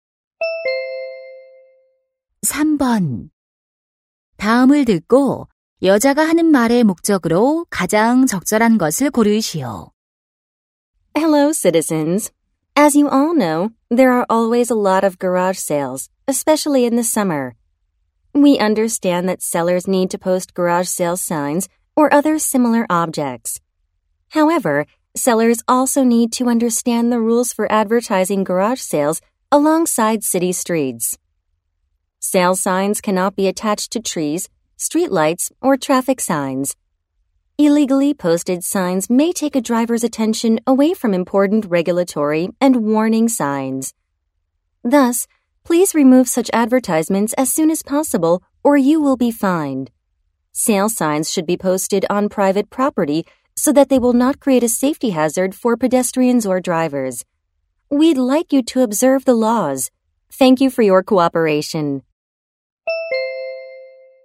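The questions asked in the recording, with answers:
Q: 다음을 듣고 여자가 하는 말의 목적으로 가장 적절한 것을 고르시오.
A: 거리의 차고 세일 광고 표지판 부착 규칙 준수를 당부하려고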